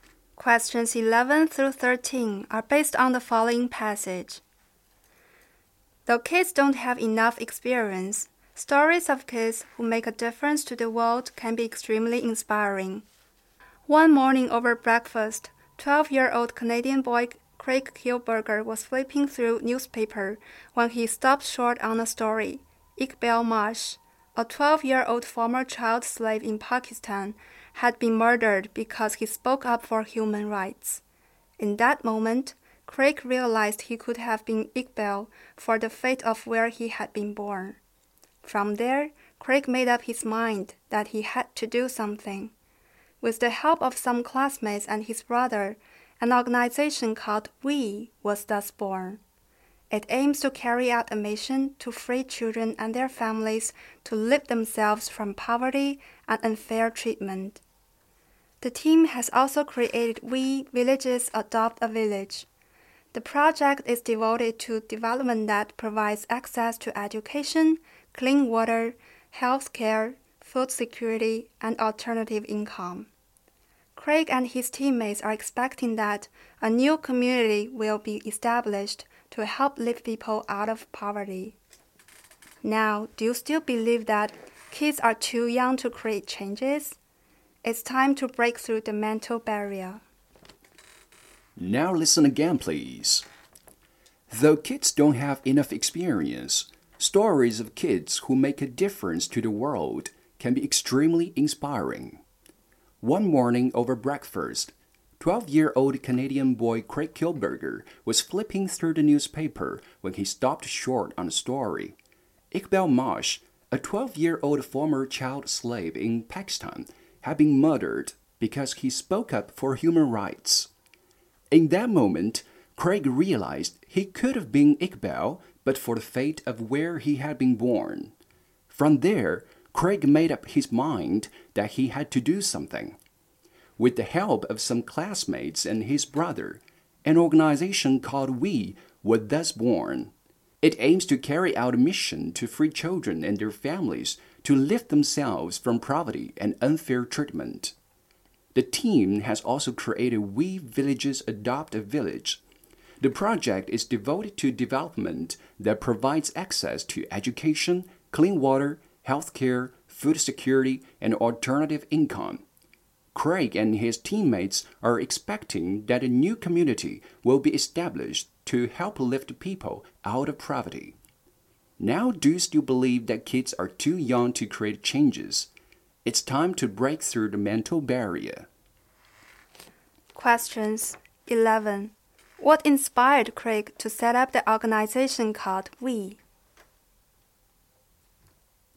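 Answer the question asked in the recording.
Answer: A newspaper story about the murder of Iqbal, a former child slave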